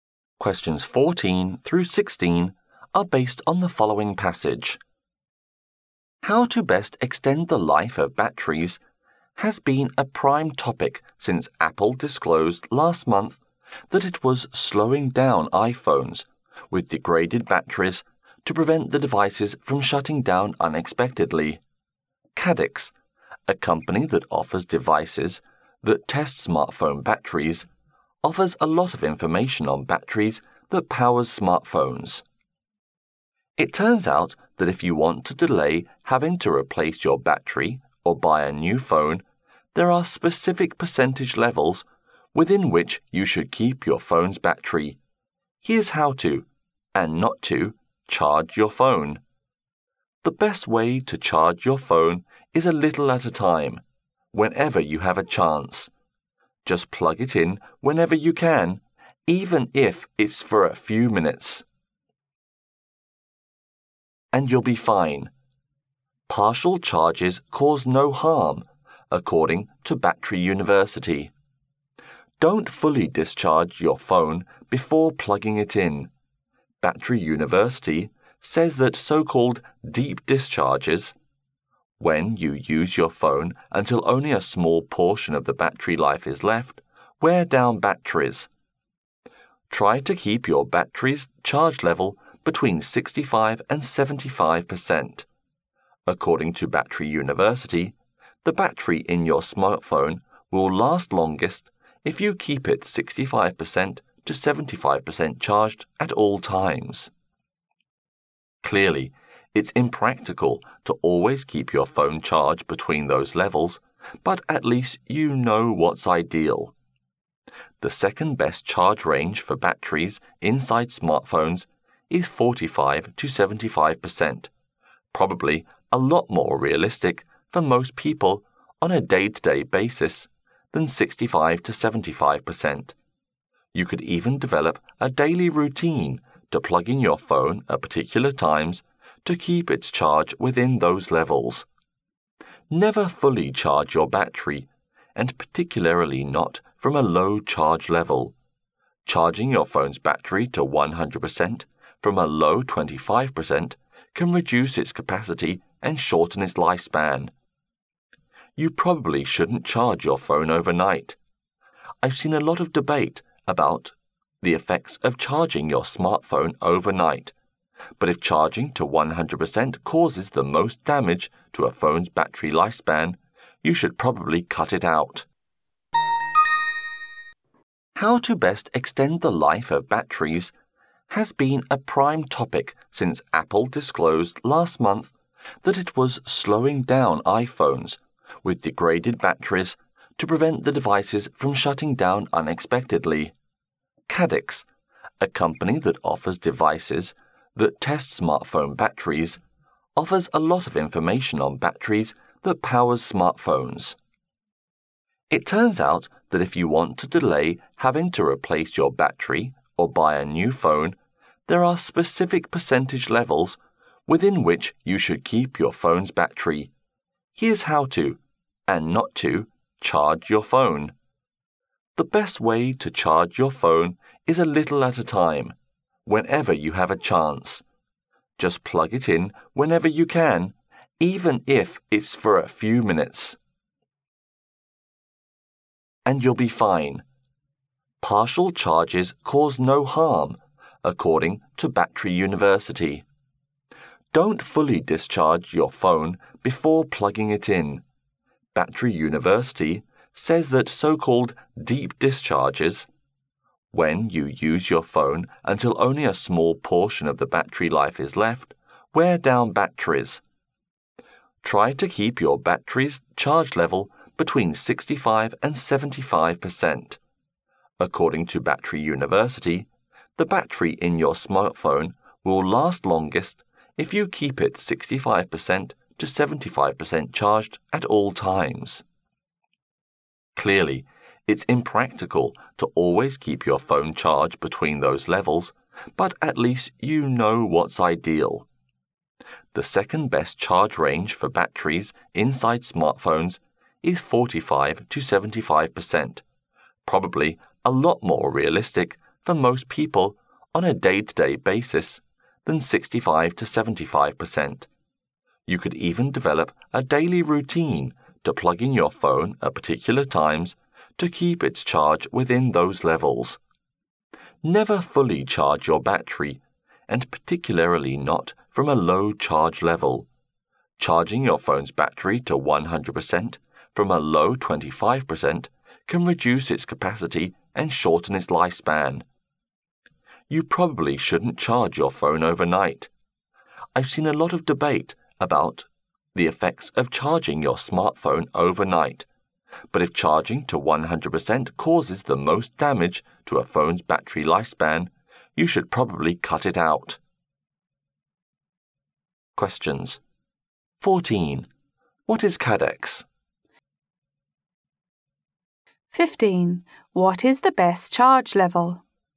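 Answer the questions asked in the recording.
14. A company that offers devices that test smartphone batteries
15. Between 65% and 75%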